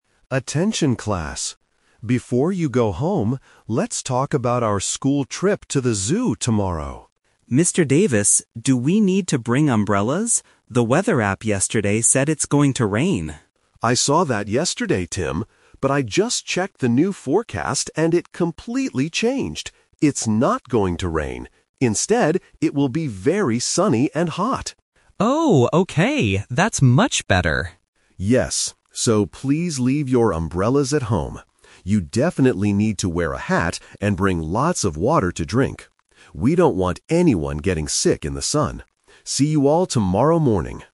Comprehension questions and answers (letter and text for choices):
Listen to the announcement and choose the correct answer (A, B, or C).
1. What did the weather app say yesterday?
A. It would be very sunny.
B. It would be windy.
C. It would rain.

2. What is the new weather forecast for the trip tomorrow?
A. Very sunny and hot.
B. Cloudy and cool.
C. Rainy and wet.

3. What does the teacher tell the students to bring?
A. Umbrellas and raincoats.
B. A hat and lots of water.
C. Extra food and snacks.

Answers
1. C. It would rain.
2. A. Very sunny and hot.
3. B. A hat and lots of water.

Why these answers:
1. The student asks, "The weather app yesterday said it's going to rain." Option (A) is the trap because that is the new forecast for tomorrow, not what the app said yesterday. Option (B) is not mentioned in the audio.
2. The teacher says the forecast changed and "it will be very sunny and hot." Option (C) is the trap because it was the old forecast that the teacher rejected. Option (B) is never mentioned.
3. The teacher clearly instructs: "You definitely need to wear a hat and bring lots of water to drink." Option (A) is a trap because umbrellas were mentioned, but the teacher explicitly says to "leave your umbrellas at home" due to the sunny weather. Option (C) is a plausible item for a trip but is never mentioned.

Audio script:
Teacher: Attention, class! Before you go home, let's talk about our school trip to the zoo tomorrow.
Student: Mr. Davis, do we need to bring umbrellas? The weather app yesterday said it's going to rain.
Teacher: I saw that yesterday, Tim. But I just checked the new forecast, and it completely changed. It's not going to rain. Instead, it will be very sunny and hot.
Student: Oh, okay! That's much better.
Teacher: Yes. So, please leave your umbrellas at home. You definitely need to wear a hat and bring lots of water to drink.